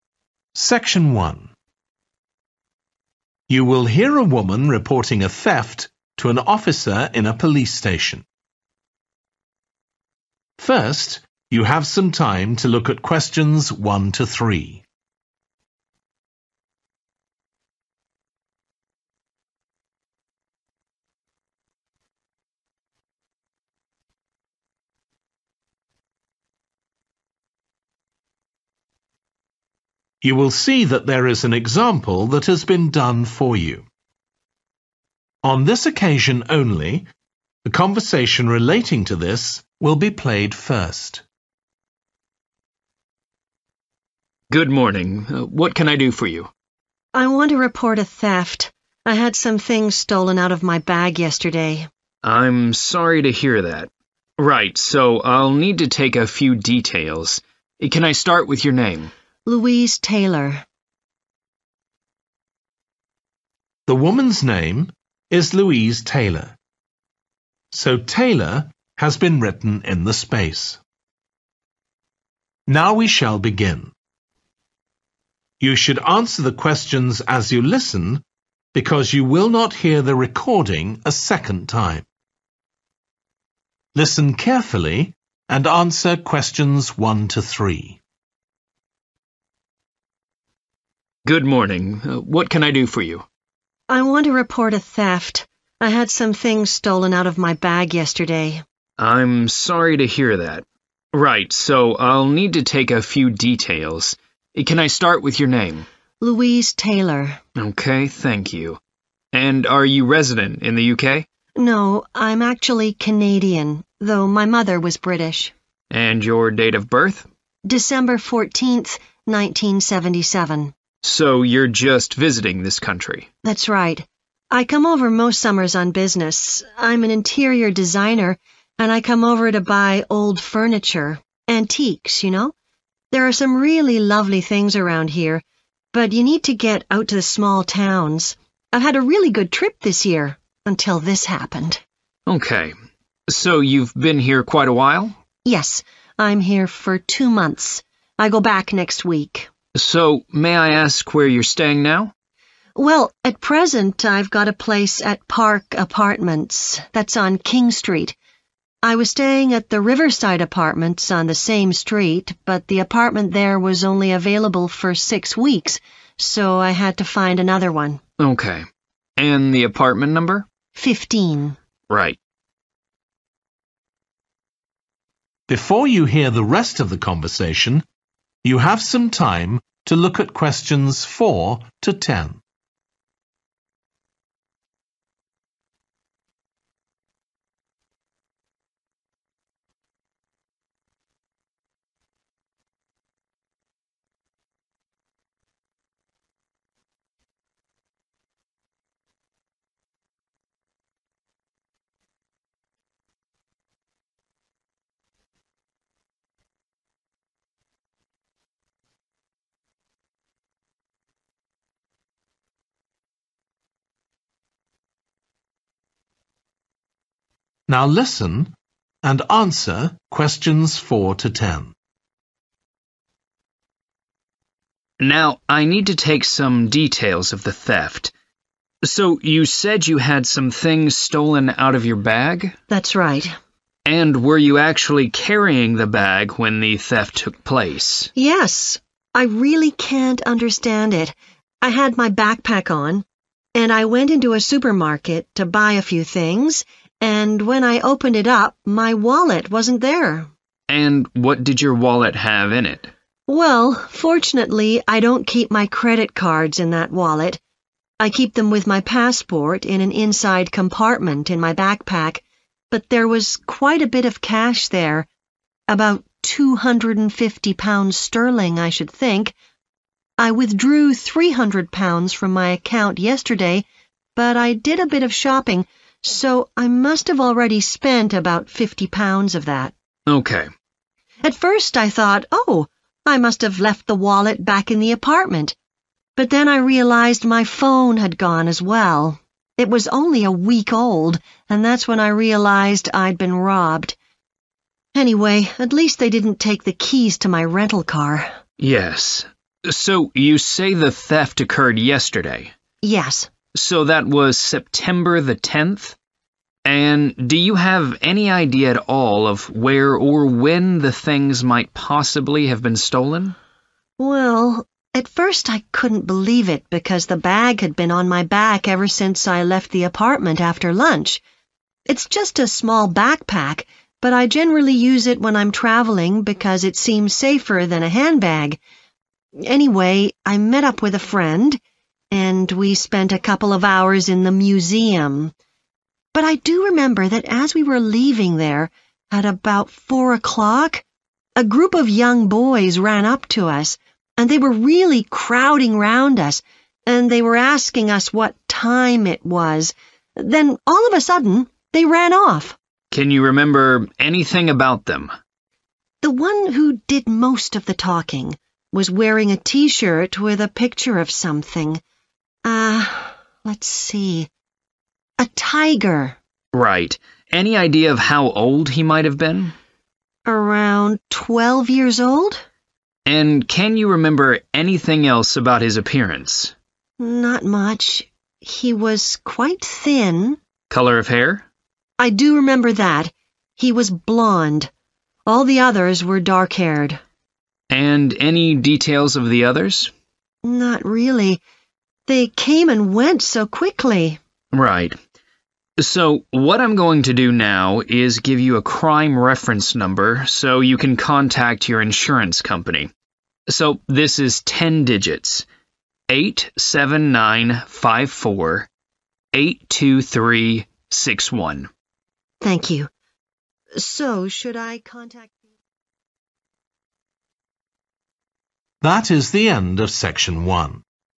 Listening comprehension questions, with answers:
Complete the form below. Write ONE WORD AND/OR A NUMBER for each answer.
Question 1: Nationality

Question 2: Reason for visit business (to buy antique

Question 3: Current address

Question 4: Items stolen – a wallet containing approximately £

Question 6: Date of theft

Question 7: Location outside the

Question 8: Details of suspect – some boys asked for the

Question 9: – he was about 12, slim build with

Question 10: Crime reference number allocated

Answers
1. Canadian
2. furniture
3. Park
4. 250 / 250 sterling
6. 10 September / 10th September
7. museum
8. time
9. blond / blonde
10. 87954 82361 / 8795482361

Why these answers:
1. The transcript indicates that the person mentioned is from Canada. Answer Explanation: The answer 'Canadian' means belonging to or coming from Canada. Reason For Correctness: The correct answer is 'Canadian' because the individual in the excerpt mentioned that they are Canadian. Therefore, it matches the nationality mentioned in the form for the 'Nationality' field.
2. The transcript mentions that the person, Louise, is an interior designer visiting to buy old furniture. Answer Explanation: The answer 'furniture' refers to items like tables, chairs, and sofas that are used to make a space comfortable or stylish. Reason For Correctness: The correct answer is 'furniture' because the excerpt specifically mentions buying old furniture. This matches the common understanding of what an interior designer might purchase for their work.
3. The transcript indicates that the speaker currently resides at Park Apartments, which is located on King Street. Answer Explanation: The answer 'Park' refers to the location mentioned in the transcript where the person is currently staying. Reason For Correctness: The correct answer is 'Park' because it matches the location described in the excerpt ('Park Apartments, on King Street'). This suggests that the person is currently living at Park Apartments on King Street, making 'Park' the appropriate answer for the form.
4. The transcript mentions that there was a significant amount of money in the wallet, approximately £250 sterling. Answer Explanation: The answer refers to the amount of money stolen, which was around £250 sterling. Reason For Correctness: The correct answer matches the information provided in the excerpt regarding the approximate amount of money in the stolen wallet. It is a direct and specific response to the details mentioned in the text.
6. The transcript says that the date is September the tenth. Answer Explanation: The answer is 10 September, which is another way to say September the tenth. Reason For Correctness: The correct answer is 10 September because it matches the information given in the transcript about the date.
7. The transcript says the person was at the museum with a friend. Answer Explanation: The answer 'museum' is the place where the theft happened. Reason For Correctness: The correct answer 'museum' is right because the excerpt says that the theft occurred at the 'museum' with a friend.
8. The transcript is describing a situation where some boys asked for something and then suddenly ran away. Answer Explanation: The answer is 'time' which means a moment or a period of time. Reason For Correctness: The correct answer is 'time' because in the excerpt, it is mentioned that 'they were asking us that time', which refers to the moment when the boys asked for something.
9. The transcript says someone had blond hair. Answer Explanation: The answer is 'blond' which means having light-colored hair. It is used to describe the color of someone's hair. Reason For Correctness: The correct answer matches the description of the suspect in the transcript, where it is mentioned that the person had 'blond hair'. Therefore, 'blond' is the correct answer to describe the suspect's hair color.
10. The transcript describes a sequence of numbers that has ten digits. Answer Explanation: The answer consists of two sequences of numbers separated by a space, with the first having five digits and the second having five digits as well. Reason For Correctness: The correct answer matches the format described in the excerpt, which is two sequences of numbers, each with the specified number of digits. Therefore, the answer '87954 82361' is correct.

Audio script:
OFFICER: Good morning. What can I do for you?
LOUISE: I want to report a theft. I had some things stolen out of my bag yesterday.
OFFICER: I'm sorry to hear that. Right, so I'll need to take a few details. Can I start with your name?
LOUISE: Louise Taylor.
OFFICER: OK, thank you. And are you resident in the UK?
LOUISE: No, I'm actually Canadian. Though my mother was British.
OFFICER: And your date of birth?
LOUISE: December 14th, 1977.
OFFICER: So you're just visiting this country?
LOUISE: That's right. I come over most summers on business. I'm an interior designer and I come over to buy old furniture, antiques you know. There are some really lovely things around here, but you need to get out to the small towns. I've had a really good trip this year, until this happened.
OFFICER: OK. So you've been here quite a while?
LOUISE: Yes, I'm here for two months. I go back next week.
OFFICER: So may I ask where you're staying now?
LOUISE: Well at present I've got a place at Park Apartments, that's on King Street. I was staying at the Riverside Apartments on the same street, but the apartment there was only available for six weeks so I had to find another one.
OFFICER: OK. And the apartment number?
LOUISE: Fifteen.
LOUISE: Right.
OFFICER: Now, I need to take some details of the theft. So you said you had some things stolen out of your bag?
LOUISE: That's right.
OFFICER: And were you actually carrying the bag when the theft took place?
LOUISE: Yes, I really can't understand it. I had my backpack on. And I went into a supermarket to buy a few things and when I opened it up my wallet wasn't there.
OFFICER: And what did your wallet have in it?
LOUISE: Well, fortunately I don't keep my credit cards in that wallet – I keep them with my passport in an inside compartment in my backpack. But there was quite a bit of cash there ... about £250 sterling, I should think. I withdrew £300 from my account yesterday, but I did a bit of shopping, so I must have already spent about £50 of that.
LOUISE: At first I thought, oh I must have left the wallet back in the apartment, but then I realised my phone had gone as well. It was only a week old, and that's when I realised I'd been robbed. Anyway at least they didn't take the keys to my rental car.
OFFICER: Yes. So you say the theft occurred yesterday?
LOUISE: Yes.
OFFICER: So that was September the tenth. And do you have any idea at all of where or when the things might possibly have been stolen?
LOUISE: Well at first I couldn't believe it because the bag had been on my back ever since I left the apartment after lunch. It's just a small backpack, but I generally use it when I'm travelling because it seems safer than a handbag. Anyway, I met up with a friend, and we spent a couple of hours in the museum. But I do remember that as we were leaving there, at about 4 o'clock, a group of young boys ran up to us, and they were really crowding round us, and they were asking us that time it was, then all of a sudden they ran off.
OFFICER: Can you remember anything about them?
LOUISE: The one who did most of the talking was wearing a T-shirt with a picture of something ... let's see ... a tiger.
OFFICER: Right. Any idea of how old he might have been?
LOUISE: Around twelve years old?
OFFICER: And can you remember anything else about his appearance?
LOUISE: Not much. He was quite thin ...
OFFICER: Colour of hair?
LOUISE: I do remember that – he was blond. All the others were dark-haired.
OFFICER: And any details of the others?
LOUISE: Not really. They came and went so quickly.
OFFICER: Right. So what I'm going to do now is give you a crime reference number so you can contact your insurance company. So this is ten digits: 87954 82361.
LOUISE: Thank you. So should I ...